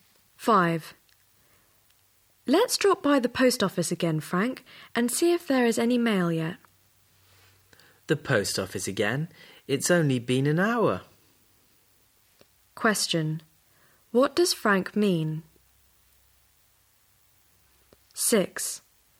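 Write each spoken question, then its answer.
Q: What does Frank mean?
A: It's too soon to check the mail again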